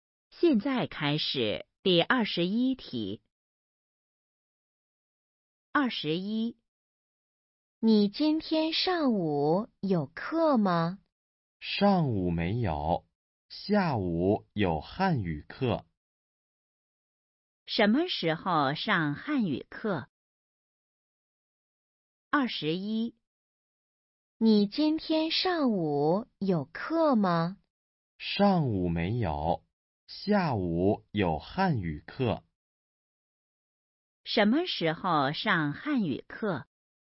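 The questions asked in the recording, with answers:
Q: 什么时候上汉语课?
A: 下午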